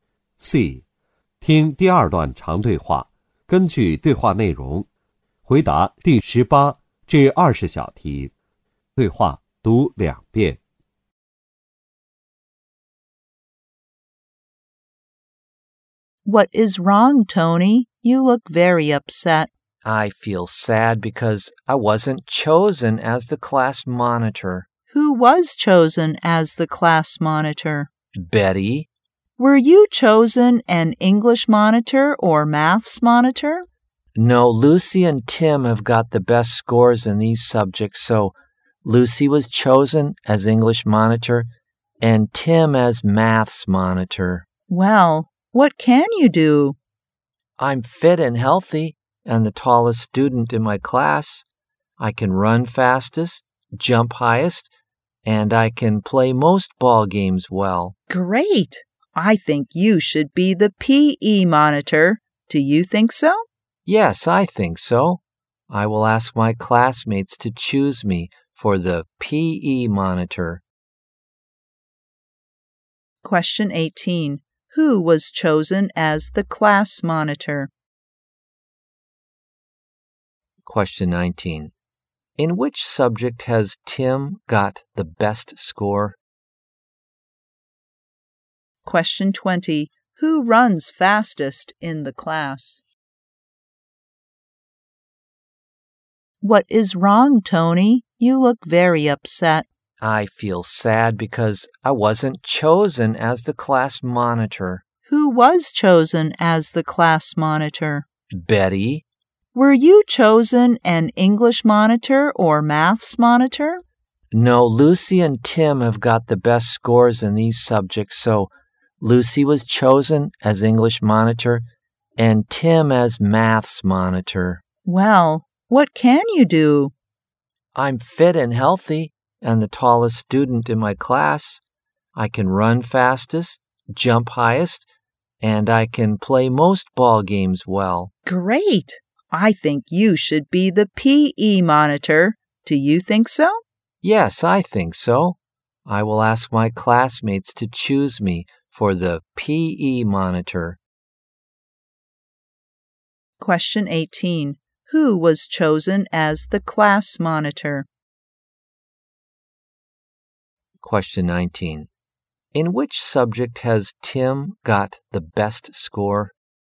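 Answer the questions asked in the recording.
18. Betty
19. Maths
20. Tony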